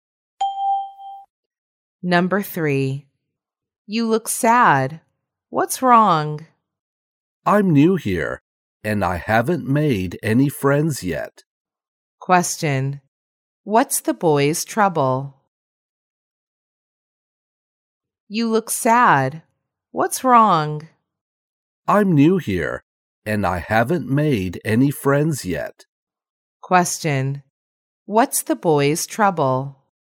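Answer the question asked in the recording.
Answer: He is new and hasn't made any friends yet.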